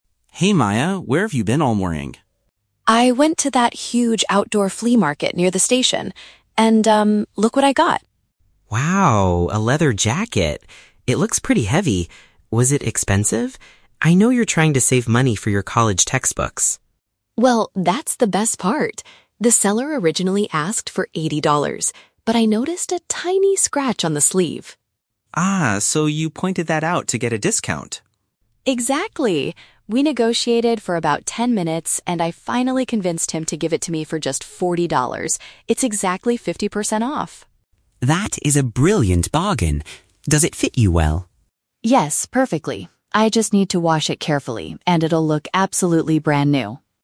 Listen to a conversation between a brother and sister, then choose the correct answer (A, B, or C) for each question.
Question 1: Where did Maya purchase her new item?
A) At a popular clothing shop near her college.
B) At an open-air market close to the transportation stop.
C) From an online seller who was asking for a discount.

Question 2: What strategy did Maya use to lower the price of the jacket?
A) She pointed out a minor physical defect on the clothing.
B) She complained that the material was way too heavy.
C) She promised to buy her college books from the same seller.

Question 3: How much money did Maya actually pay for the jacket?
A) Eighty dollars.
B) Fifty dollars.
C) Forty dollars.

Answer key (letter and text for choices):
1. B) At an open-air market close to the transportation stop.
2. A) She pointed out a minor physical defect on the clothing.
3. C) Forty dollars.

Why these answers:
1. Maya says she went to an "outdoor flea market near the station." "Open-air market" is a paraphrase for outdoor flea market, and "transportation stop" is a paraphrase for the station. Why the trap is wrong: Option (A) is the trap. Lucas mentions her "college," but that is regarding the textbooks she is saving money for, not where she bought the jacket. Option (C) is a plausible shopping method, but the internet is never mentioned in the audio.
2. Maya mentions that she "noticed a tiny scratch on the sleeve" to get a discount. A "minor physical defect" is a paraphrase for a tiny scratch. Why the trap is wrong: Option (B) is the trap. Lucas says the jacket "looks pretty heavy," but Maya did not complain about its weight to lower the price. Option (C) is also a trap because college books are what she is saving her money for, completely unrelated to the seller at the flea market.
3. Maya proudly states that she convinced the seller to give it to her for "just forty dollars." Why the trap is wrong: Option (A) is the trap. Eighty dollars is what the seller "originally asked for," not what she actually paid. Option (B) is another trap based on the number "fifty" ("fifty percent off"), which is the discount rate, not the final price in dollars.

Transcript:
Lucas: Hey Maya, where have you been all morning?
Maya: I went to that huge outdoor flea market near the station. And, um, look what I got!
Lucas: Wow, a leather jacket. It looks pretty heavy. Was it expensive? I know you're trying to save money for your college textbooks.
Maya: Well, that's the best part! The seller originally asked for eighty dollars. But I noticed a tiny scratch on the sleeve.
Lucas: Ah, so you pointed that out to get a discount?
Maya: Exactly! We negotiated for about ten minutes, and I finally convinced him to give it to me for just forty dollars. It's exactly fifty percent off!
Lucas: That is a brilliant bargain. Does it fit you well?
Maya: Yes, perfectly. I just need to wash it carefully, and it'll look absolutely brand new.